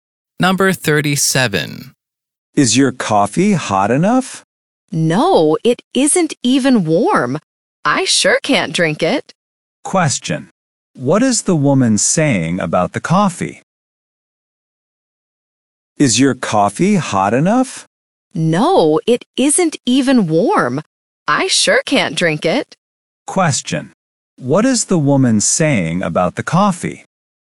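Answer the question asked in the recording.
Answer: It isn't even warm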